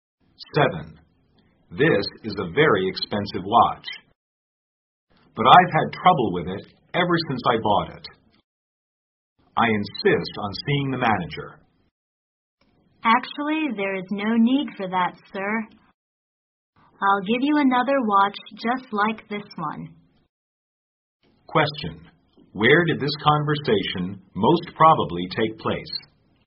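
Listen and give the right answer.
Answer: In a store that sells watches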